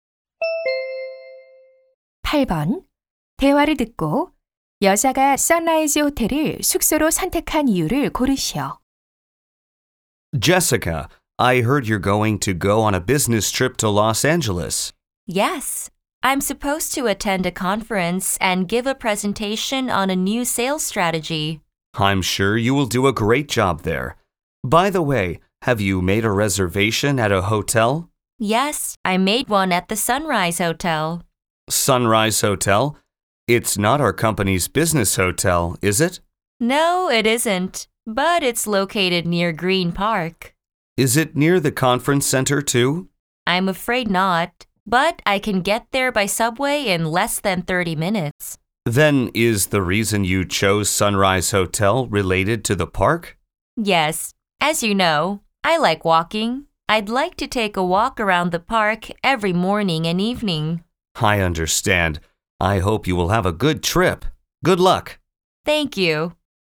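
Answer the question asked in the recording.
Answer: 공원을 산책하고 싶어서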